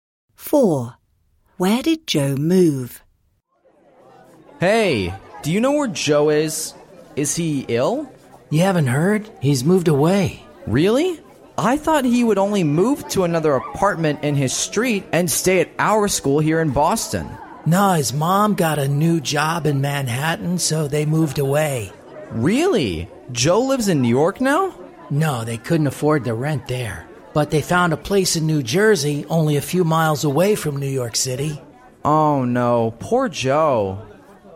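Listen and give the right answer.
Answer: To New Jersey, a few miles from New York City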